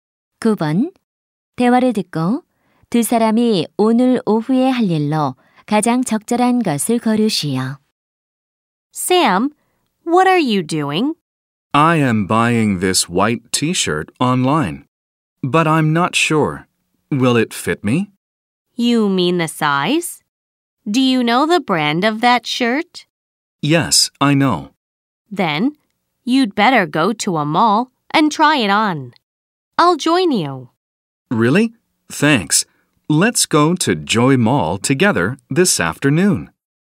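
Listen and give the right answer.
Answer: 쇼핑몰에 가서 티셔츠 입어 보기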